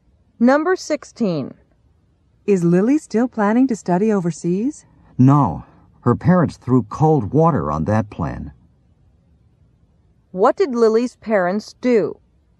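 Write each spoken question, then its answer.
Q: What did Lily's parents do?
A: They discouraged her plan to study overseas.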